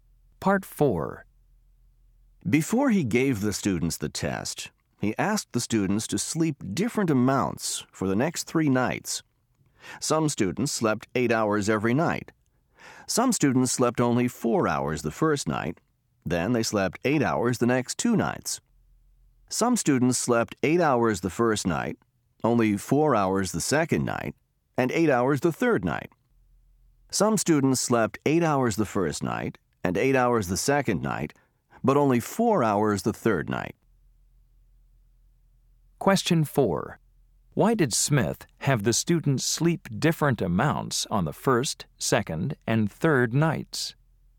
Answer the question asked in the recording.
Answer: Smith wanted to see if sleeping only a few hours for 3 nights after learning something new affects the memory.